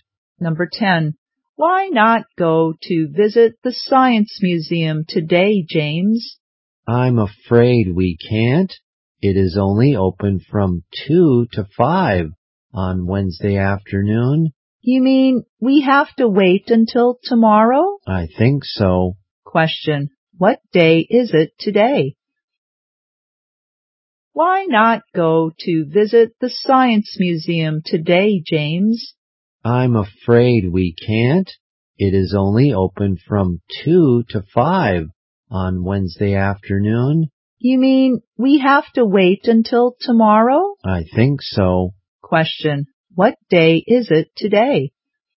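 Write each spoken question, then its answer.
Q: Question. What day is it today?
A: Tuesday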